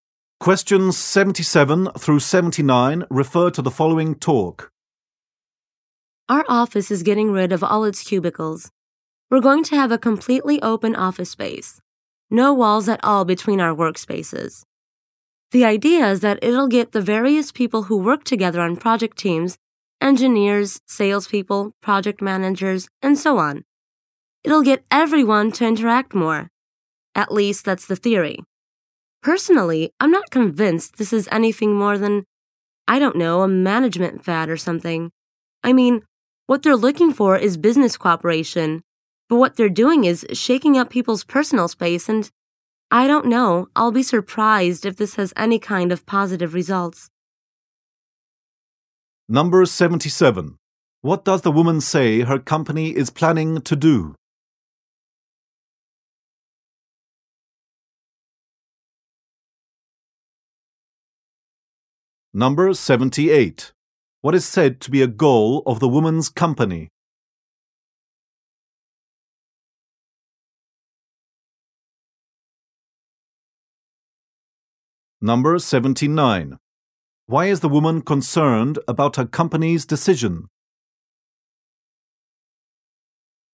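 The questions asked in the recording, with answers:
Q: What does the woman say her company is planning to do?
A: Remove cubicles and create an open office

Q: What is said to be a goal of the woman's company?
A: Getting employees to interact more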